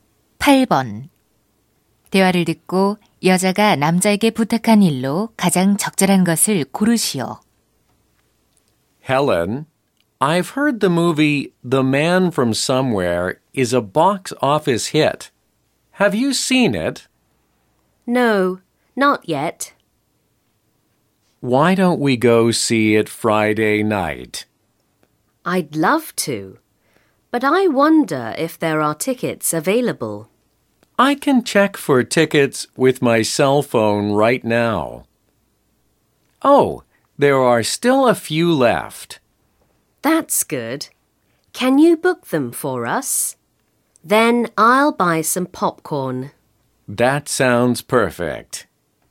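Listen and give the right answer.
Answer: 영화표 예매하기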